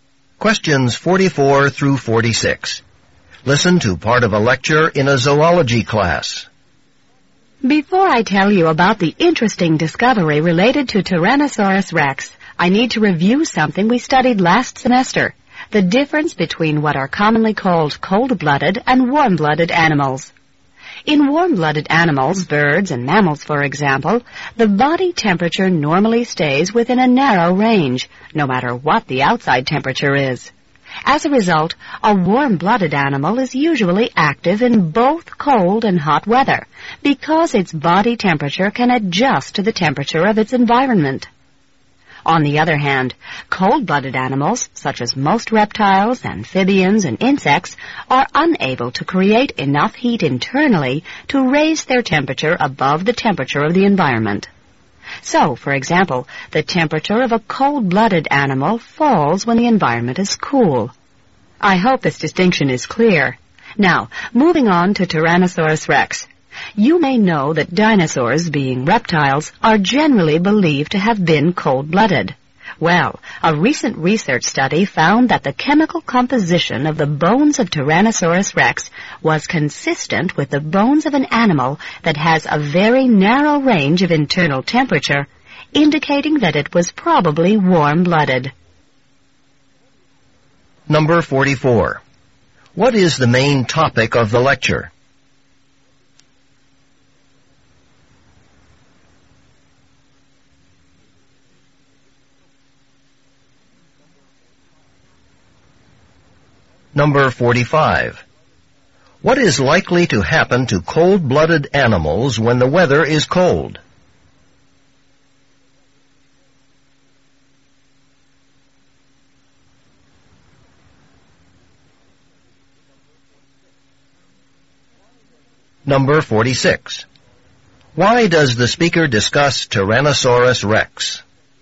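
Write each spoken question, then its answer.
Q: What is likely to happen to cold-blooded animals when the weather is cold?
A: Their body temperature falls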